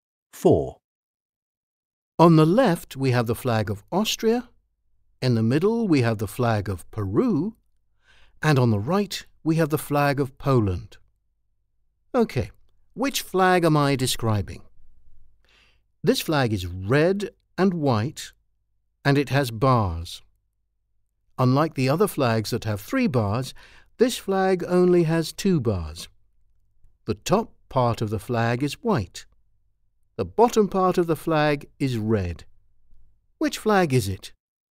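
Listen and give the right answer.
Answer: C: the flag of Poland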